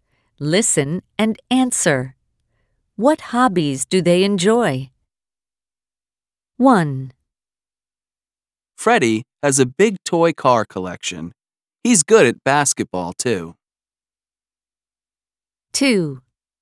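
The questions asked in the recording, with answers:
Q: What hobbies do they enjoy?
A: Freddie collects toy cars and plays basketball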